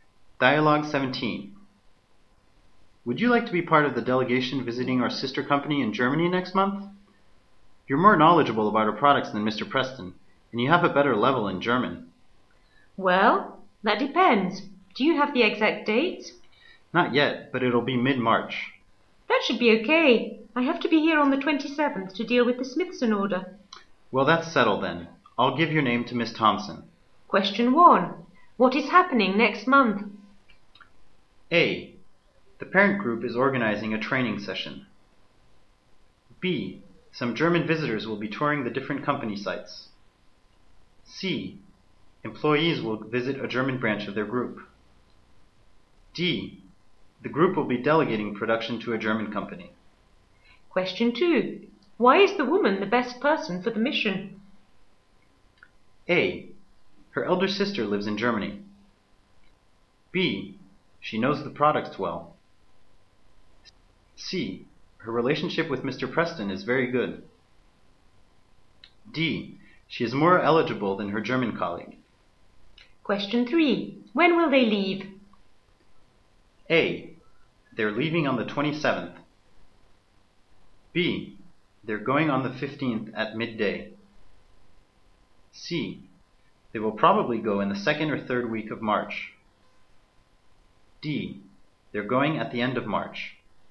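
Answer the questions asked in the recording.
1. C: Employees will visit a German branch of their group.
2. B: She knows the products well.
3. C: They will probably go in the second or third week of March.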